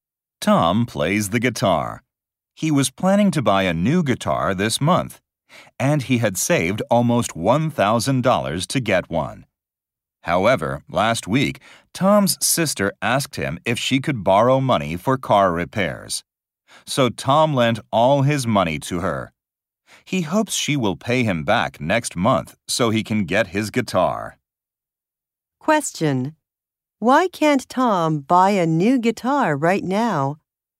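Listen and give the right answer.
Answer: He lent his money to his sister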